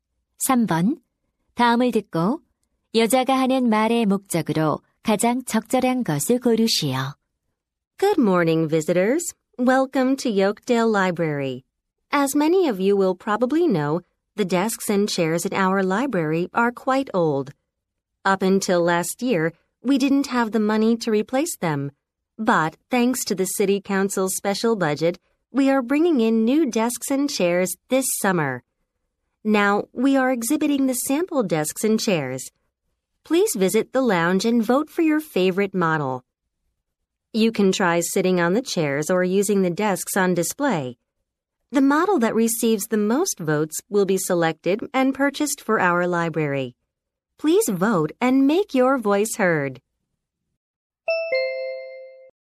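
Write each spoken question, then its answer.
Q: 다음을 듣고 여자가 하는 말의 목적으로 가장 적절한 것을 고르시오.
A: 도서관에 들일 새 책상과 의자 모델에 투표하도록 독려하려고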